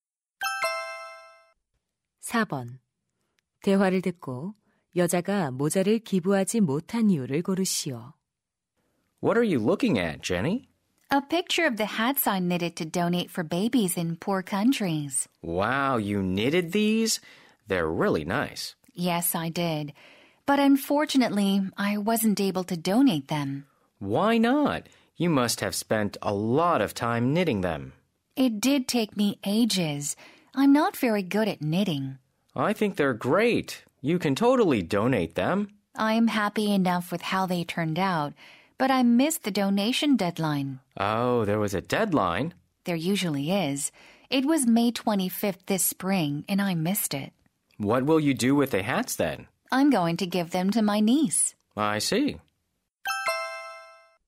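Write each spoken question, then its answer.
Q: 대화를 듣고 여자가 모자를 기부하지 못한 이유를 고르시오.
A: 기부 마감일을 놓쳐서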